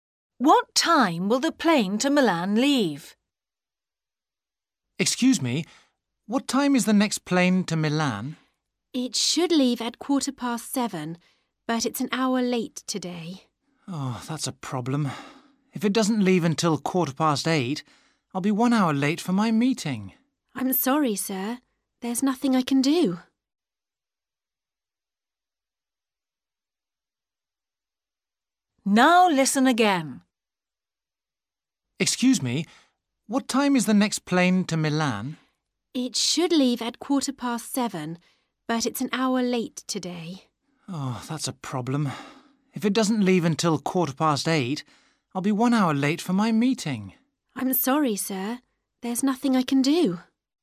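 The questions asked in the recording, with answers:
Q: What time will the plane to Milan leave?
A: 8:15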